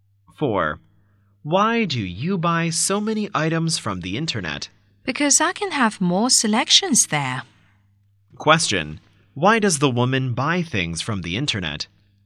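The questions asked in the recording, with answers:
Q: Why does the woman buy things from the internet?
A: She can have more selections there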